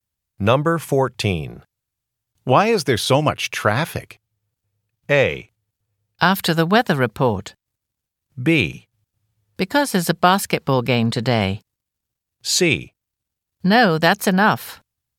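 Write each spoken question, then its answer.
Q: Why is there so much traffic?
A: B: Because there's a basketball game today.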